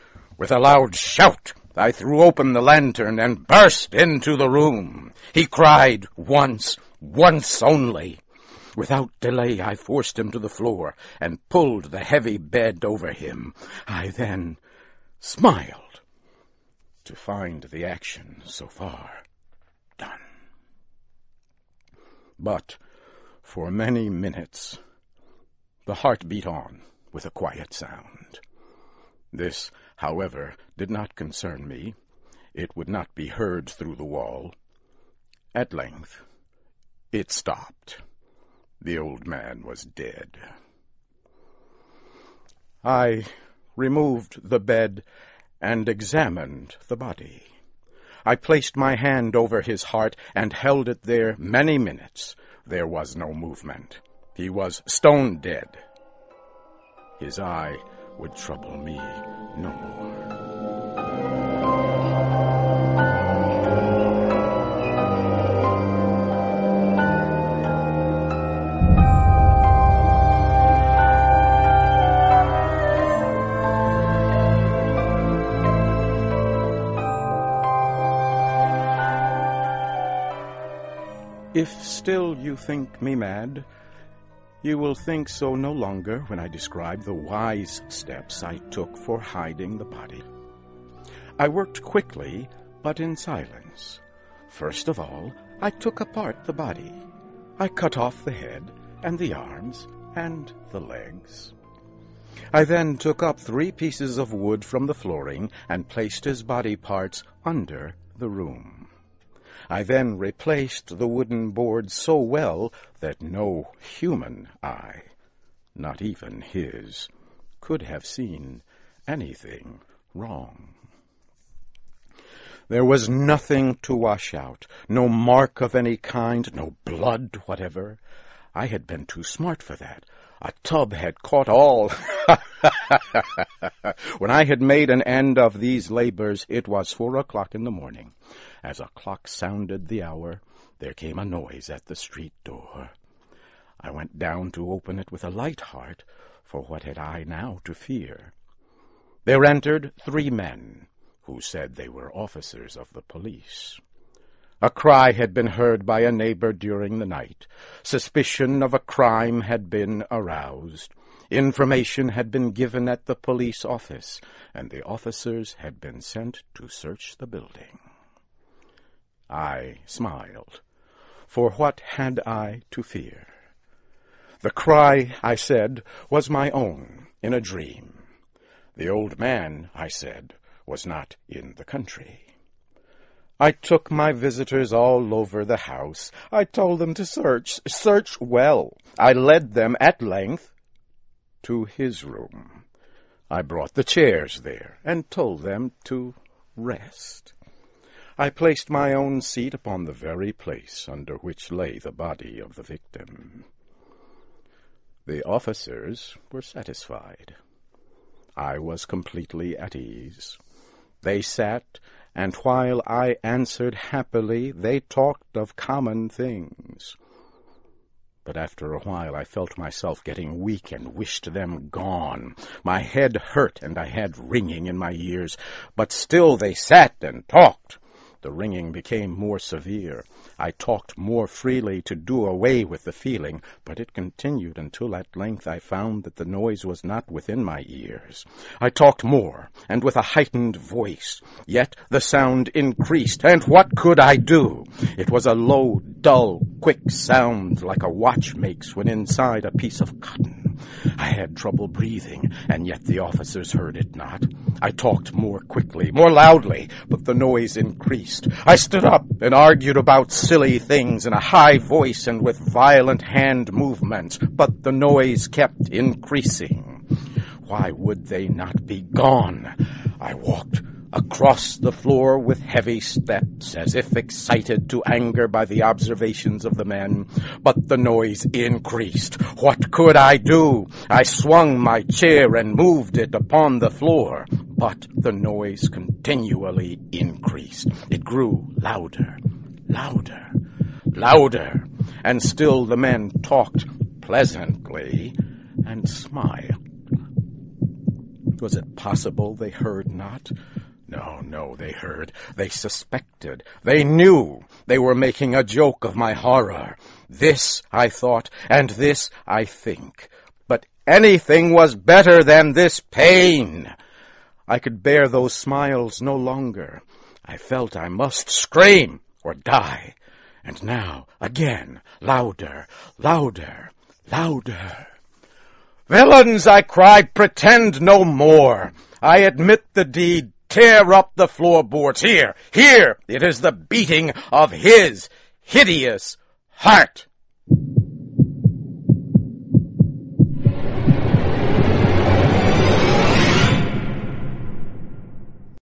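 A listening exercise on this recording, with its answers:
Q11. After the old man was dead, what was the first thing the narrator did to conceal the body?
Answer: dismembered it

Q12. What was the next thing he did to conceal the body?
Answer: buried it beneath the floor

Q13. Why were the police sent to the house?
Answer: a shriek was heard

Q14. What was it that made the narrator confess to the crime?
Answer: the old man's heartbeat

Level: CAE - Certificate in Advanced English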